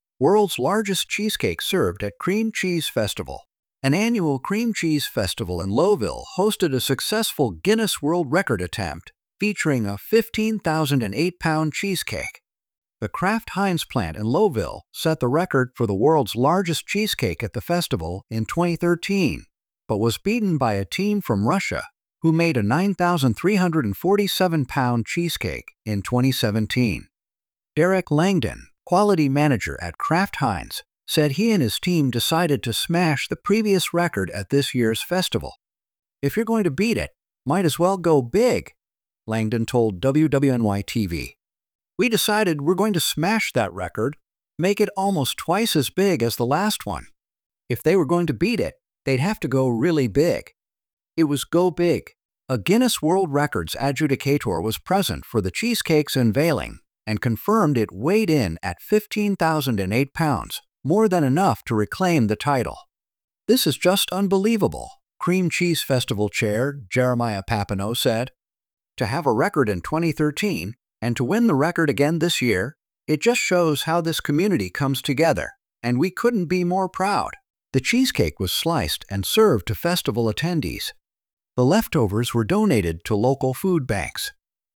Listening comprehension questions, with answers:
Döntsd el, hogy az alábbi állítások igazak, vagy hamisak!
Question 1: The Cream Cheese Festival in Lowville, N.Y., is held every year.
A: True

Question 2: The Kraft-Heinz plant in Lowville set the record for the world's largest cheesecake in 2017.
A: False

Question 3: Derrick Langdon and his team aimed to make a cheesecake almost twice as big as the previous record.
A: True

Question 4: A Guinness World Records adjudicator confirmed the cheesecake's weight at 15,008 pounds.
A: True

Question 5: The festival attendees were not allowed to taste the cheesecake.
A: False

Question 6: The leftover cheesecake was thrown away after the festival.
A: False

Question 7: Jeremiah Papineau expressed pride in the community's achievement.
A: True

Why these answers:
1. The text mentions it is an annual festival.
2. The text states the Kraft-Heinz plant set the record in 2013, not 2017.
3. The text quotes Langdon saying they aimed to make it almost twice as big.
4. The text confirms a Guinness World Records adjudicator verified the weight.
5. The text states the cheesecake was sliced and served to attendees.
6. The text mentions the leftovers were donated to local food banks.
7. The text quotes Papineau expressing pride in the community's achievement.

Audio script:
World's largest cheesecake served at Cream Cheese Festival in N.Y.
An annual Cream Cheese Festival in Lowville, N.Y., hosted a successful Guinness World Record attempt featuring a 15,008-pound cheesecake.
The Kraft-Heinz plant in Lowville set the record for the world's largest cheesecake at the festival in 2013, but was beaten by a team from Russia who made a 9,347-pound cheesecake in 2017.
Derrick Langdon, quality manager at Kraft-Heinz, said he and his team decided to smash the previous record at this year's festival.
"If you're going to beat it, might as well go big," Langdon told WWNY-TV. "We decided we're going to smash that record, make it almost twice as big as the last one. If they were going to beat it, they'd have to go really big. It was go big."
A Guinness World Records adjudicator was present for the cheesecake's unveiling and confirmed it weighed in at 15,008 pounds, more than enough to reclaim the title.
"This is just unbelievable," Cream Cheese Festival Chair Jeremiah Papineau said. "To have a record in 2013, and to win the record again this year, it just shows how this community comes together, and we couldn't be more proud."
The cheesecake was sliced and served to festival attendees. The leftovers were donated to local food banks.